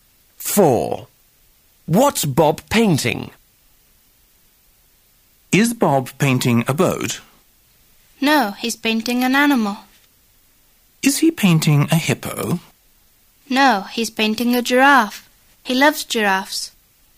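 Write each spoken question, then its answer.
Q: What's Bob painting?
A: A giraffe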